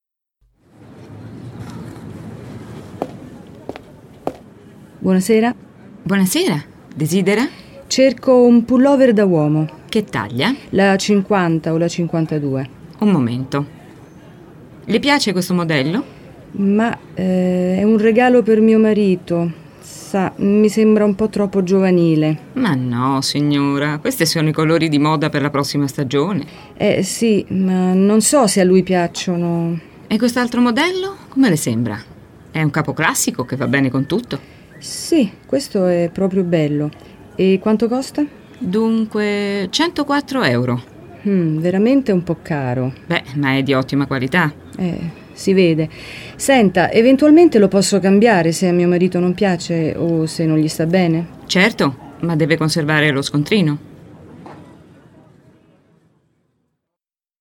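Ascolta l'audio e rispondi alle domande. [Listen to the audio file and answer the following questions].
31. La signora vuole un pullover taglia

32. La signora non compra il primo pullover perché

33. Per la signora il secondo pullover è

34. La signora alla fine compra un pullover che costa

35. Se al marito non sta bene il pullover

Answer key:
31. 50 o 52
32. le sembra troppo giovanile
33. bello ma un po' caro
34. 104 euro
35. lo può cambiare conservando lo scontrino

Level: CEFR levels : A1.1 - A1.5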